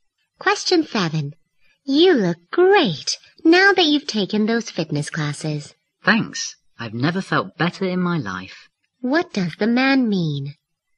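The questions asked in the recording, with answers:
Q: What does the man mean?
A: He has never felt better, thanks to the fitness classes.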